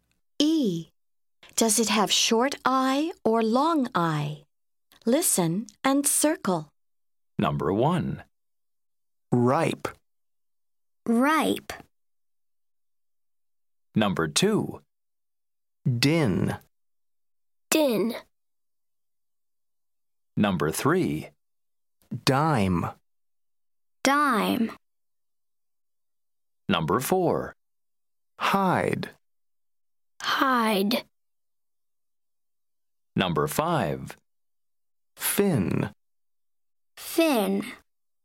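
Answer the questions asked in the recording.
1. long I (ripe)
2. short I (din)
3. long I (dime)
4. long I (hide)
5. short I (fin)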